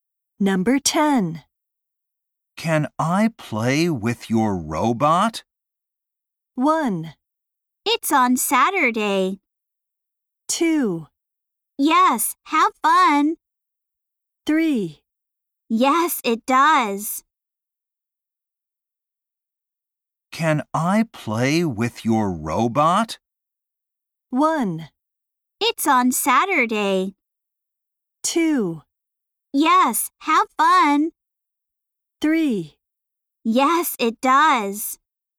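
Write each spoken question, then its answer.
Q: Can I play with your robot?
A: 2: Yes, have fun.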